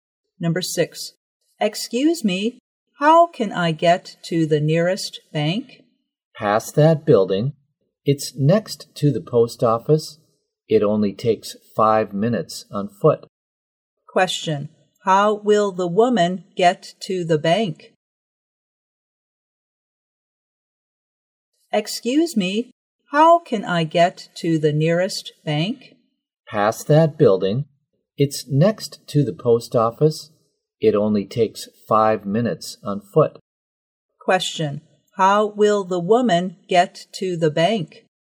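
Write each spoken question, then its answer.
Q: Question, how will the woman get to the bank?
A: On foot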